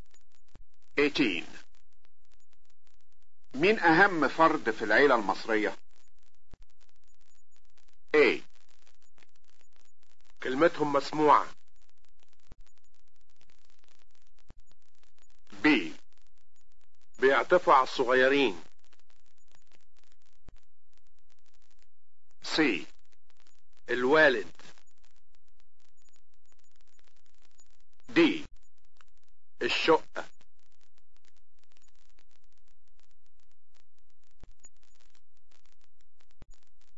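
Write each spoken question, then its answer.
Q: مين اهم فرد في العيلة المصرية؟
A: C: الوالد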